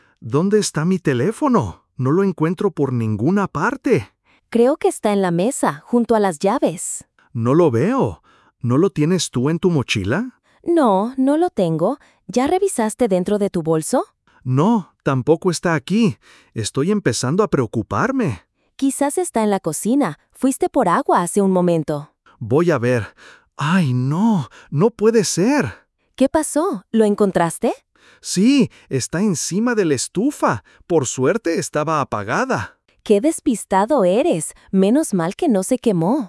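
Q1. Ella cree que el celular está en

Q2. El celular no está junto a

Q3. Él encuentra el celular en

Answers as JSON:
{"1": "la mesa", "2": "las llaves", "3": "la cocina, encima de la estufa"}

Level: Level 1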